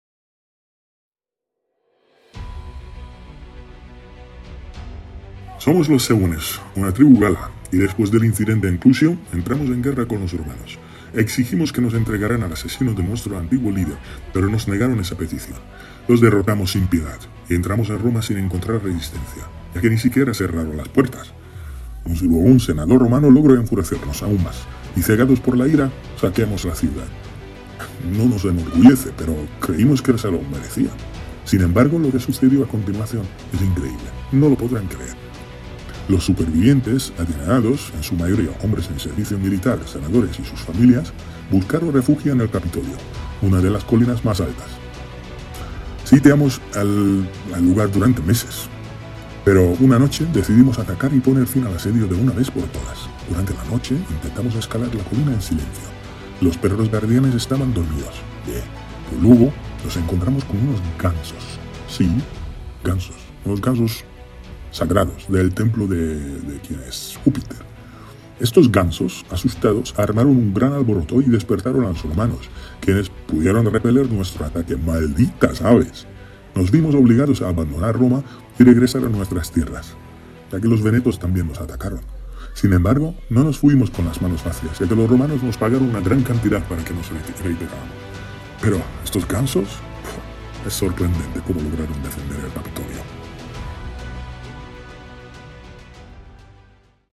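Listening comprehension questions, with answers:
¿Qué animales salvaron a Roma en el ataque de los galos en el siglo IV a.C.?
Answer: Los gansos sagrados del templo de Júpiter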